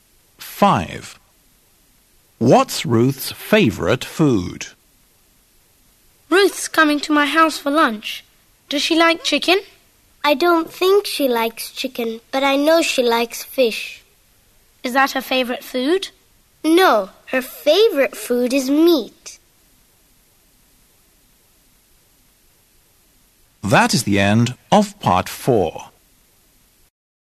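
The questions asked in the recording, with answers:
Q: What's Ruth's favourite food?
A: meat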